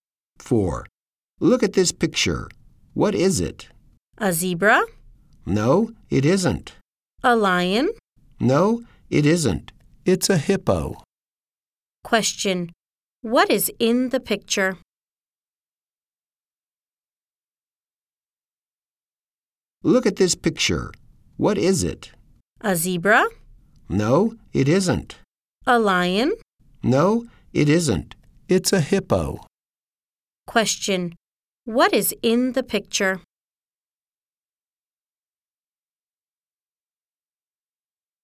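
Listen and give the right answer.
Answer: A hippo.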